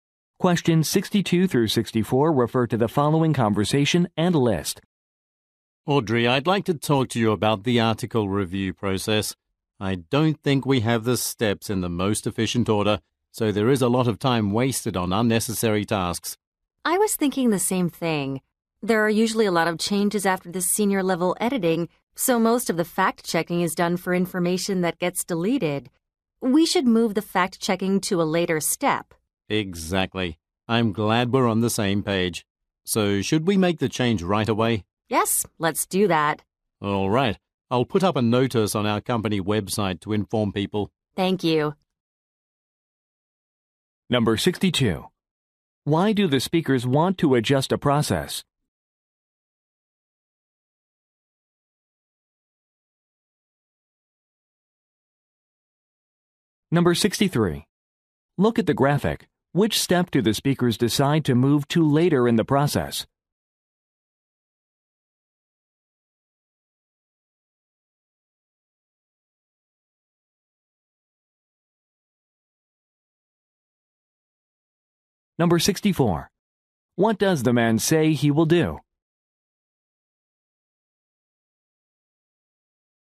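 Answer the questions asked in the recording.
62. Too much time is wasted on unnecessary tasks
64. Post a notice on the company website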